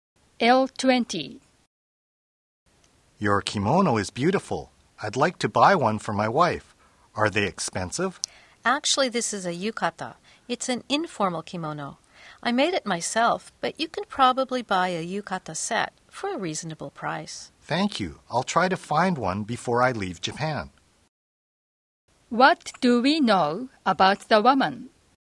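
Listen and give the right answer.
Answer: She made her yukata herself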